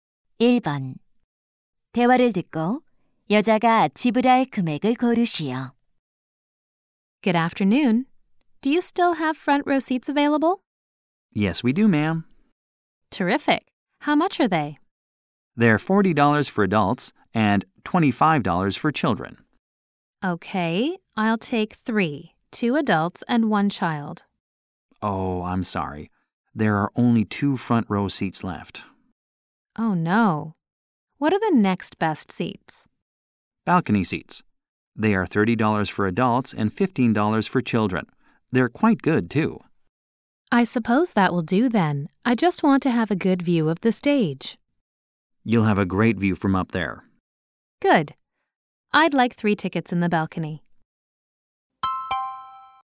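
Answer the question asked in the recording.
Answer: $75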